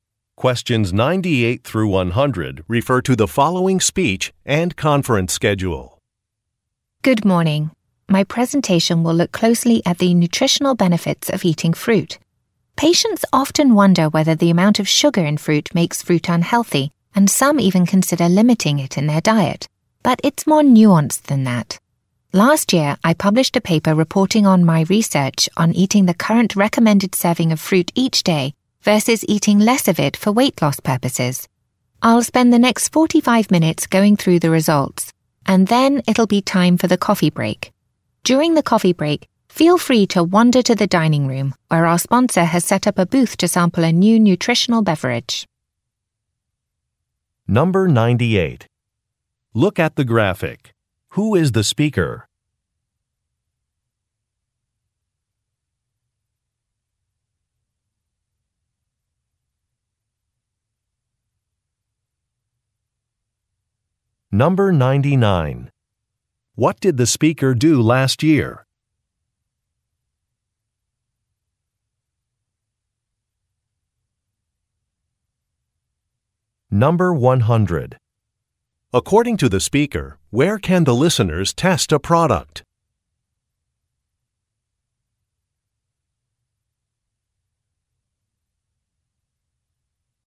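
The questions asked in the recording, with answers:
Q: What did the speaker do last year?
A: Published a research paper

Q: According to the speaker, where can the listeners test a product?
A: In the dining room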